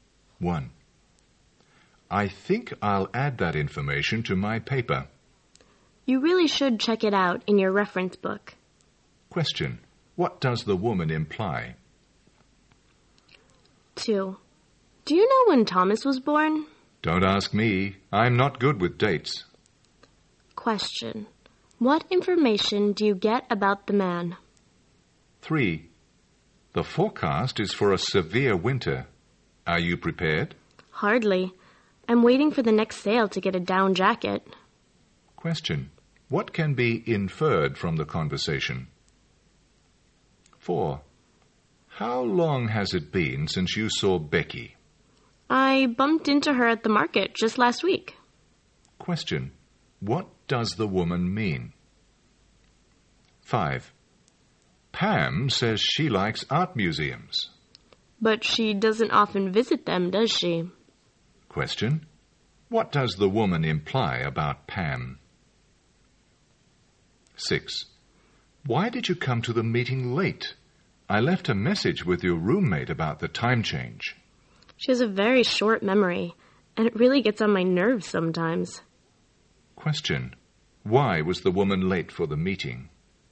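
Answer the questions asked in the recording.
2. He doesn't know when Thomas was born; he's not good with dates.
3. The man isn't ready for winter yet; he's waiting for a sale to buy a down jacket.
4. She saw Becky at the market just last week.
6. Her roommate forgot to pass on the message about the time change.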